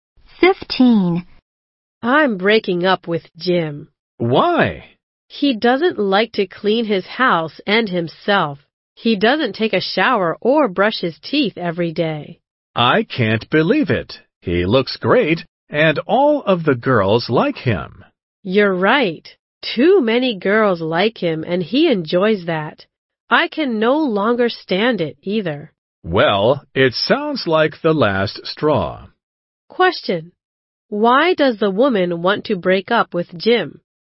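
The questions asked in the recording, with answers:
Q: Why does the woman want to break up with Jim?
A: He is dirty and doesn't clean himself, and he enjoys having too many girls like him.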